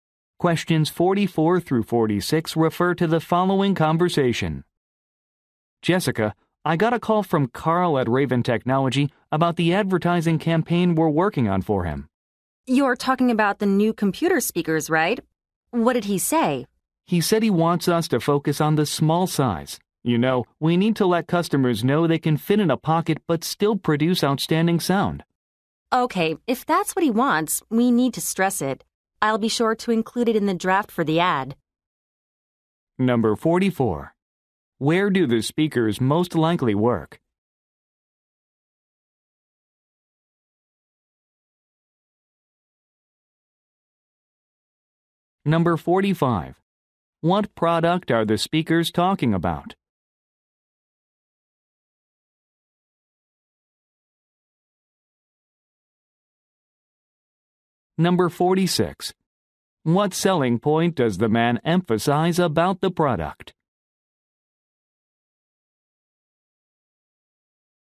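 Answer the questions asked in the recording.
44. At an advertising agency
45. Computer speakers
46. Its small size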